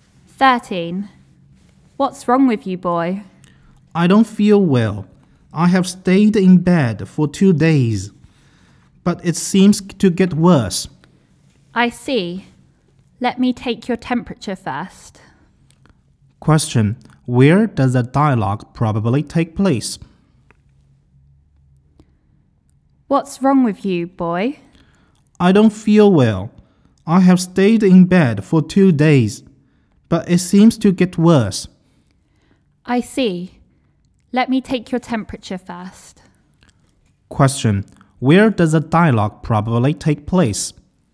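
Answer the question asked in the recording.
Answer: In a hospital/clinic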